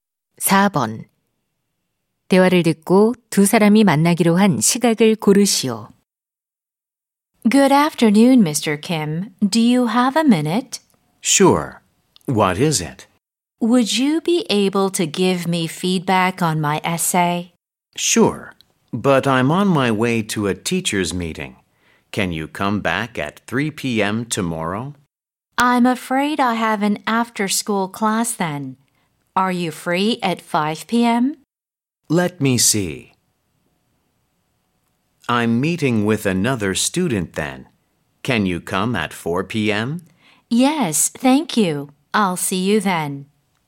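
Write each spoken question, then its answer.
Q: 대화를 듣고 두 사람이 만나기로 한 시각을 고르시오.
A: 오후 4시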